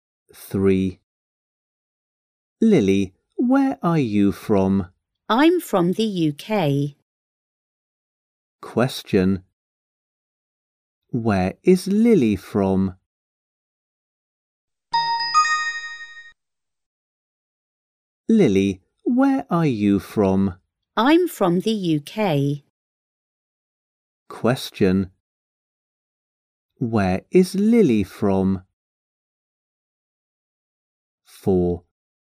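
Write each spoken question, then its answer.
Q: Where is Lily from?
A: the UK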